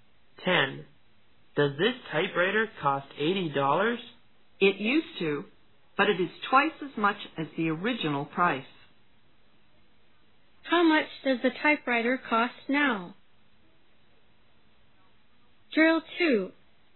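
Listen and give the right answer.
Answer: $160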